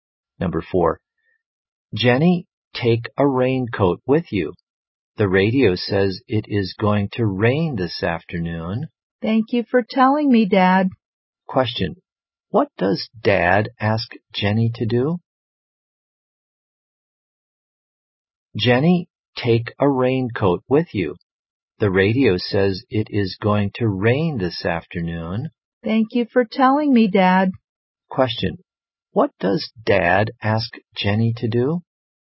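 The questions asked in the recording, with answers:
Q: Question, what does Dad ask Jenny to do?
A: Take a raincoat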